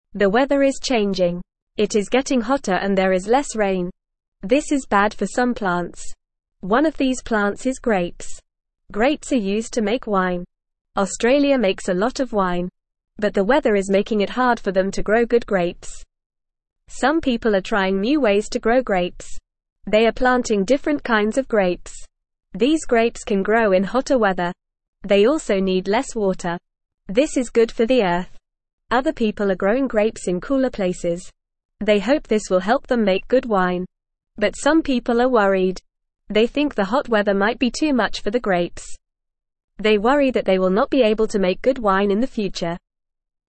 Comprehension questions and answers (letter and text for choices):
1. What plant is having trouble growing because of the weather?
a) Apples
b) Grapes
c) Oranges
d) Strawberries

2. What do people use grapes for?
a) Making juice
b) Making clothes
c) Building houses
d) Making wine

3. What country is having trouble growing grapes?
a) China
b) Brazil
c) Australia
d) Canada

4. What are some people doing to grow grapes in hot weather?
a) Planting different kinds of grapes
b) Using more water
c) Moving to colder places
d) Not growing grapes anymore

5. Why are these new grapes good for the Earth?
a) They need more water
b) They need less water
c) They grow faster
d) They are bigger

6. What are other people doing to grow grapes?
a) Planting them in cooler places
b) Using more sunlight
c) Planting them in the desert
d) Growing them indoors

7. What are some people worried about?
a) There will be too much wine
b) The weather will not change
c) They will not be able to make good wine in the future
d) Grapes will become too expensive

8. It is getting (1)______ and there is less (2)______.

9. It is getting (1)______ and there is less (2)______.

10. One of these plants is (3)______.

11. They also need less (4)______.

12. Other people are growing grapes in cooler (5)______.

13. They worry that they will not be able to make good (6)______ in the future.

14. The weather is staying the same.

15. Grapes are used to make wine.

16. Australia does not make wine.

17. The weather is making it easy to grow grapes.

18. People are trying new ways to grow grapes.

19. The new grapes need more water.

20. Some people are growing grapes in cooler places.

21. Everyone is happy about the hot weather.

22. What plant is the changing weather bad for?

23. What do we use grapes for?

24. Which country makes a lot of wine?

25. Where are other people growing grapes?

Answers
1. b) Grapes
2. d) Making wine
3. c) Australia
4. a) Planting different kinds of grapes
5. b) They need less water
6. a) Planting them in cooler places
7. c) They will not be able to make good wine in the future
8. hotter
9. rain
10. grapes
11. water
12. places
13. wine
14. False
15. True
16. False
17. False
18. True
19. False
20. True
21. False
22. The changing weather is bad for grapes.
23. We use grapes to make wine.
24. Australia makes a lot of wine.
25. Other people are growing grapes in cooler places.

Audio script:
The weather is changing. It is getting hotter and there is less rain. This is bad for some plants. One of these plants is grapes. Australia makes a lot of wine. But the weather is making it hard for them to grow good grapes.
Some people are trying new ways to grow grapes. They are planting different kinds of grapes. These grapes can grow in hotter weather. They also need less water. This is good for the Earth. Other people are growing grapes in cooler places. They hope this will help them make good wine. But some people are worried. They think the hot weather might be too much for the grapes. They worry that they will not be able to make good wine in the future.

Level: Level 1